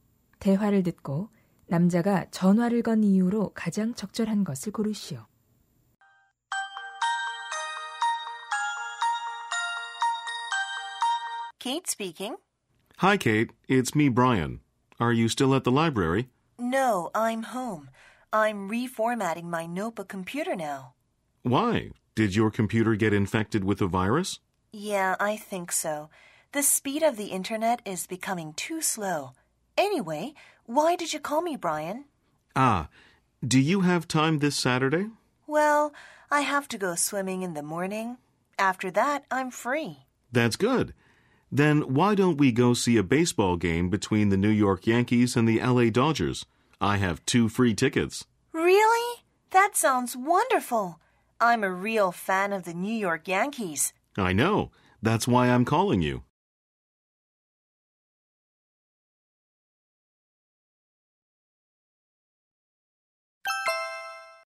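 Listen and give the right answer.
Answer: 야구 경기를 함께 보러 가자고 제안하려고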